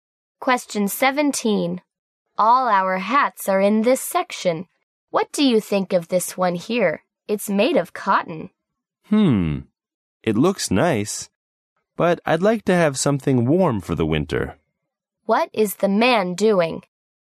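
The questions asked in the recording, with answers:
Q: What is the man doing?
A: Shopping for a warm winter hat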